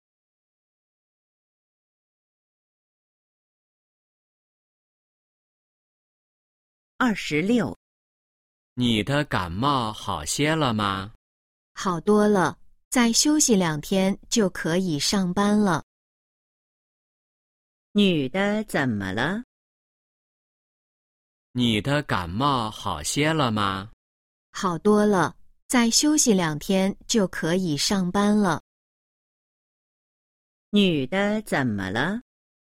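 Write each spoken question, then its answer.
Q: 女的怎么了?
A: 感冒了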